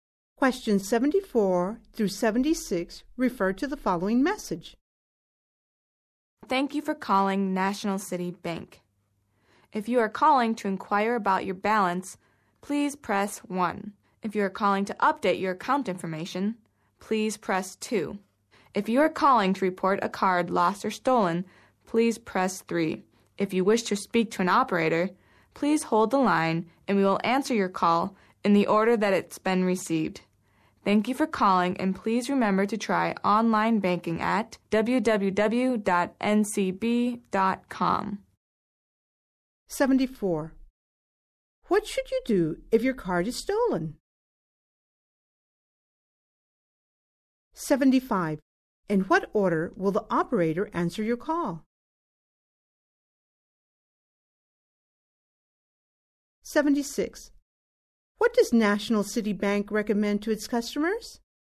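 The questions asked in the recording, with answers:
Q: What should you do if your card is stolen?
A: Press 3

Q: In what order will the operator answer your call?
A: In the order it was received

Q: What does National City Bank recommend to its customers?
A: Try online banking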